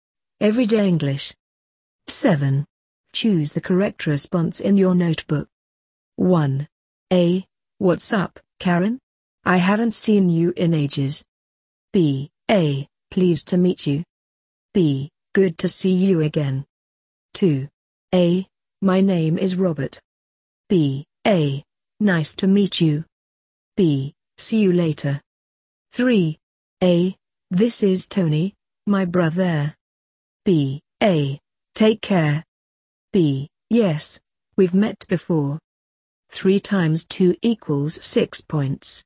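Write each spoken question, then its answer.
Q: A. What's up, Karen? I haven't seen you in ages.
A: B: Good to see you again.

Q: A. My name is Robert.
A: A: Nice to meet you.

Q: A. This is Tony, my brother.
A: B: Yes, we've met before.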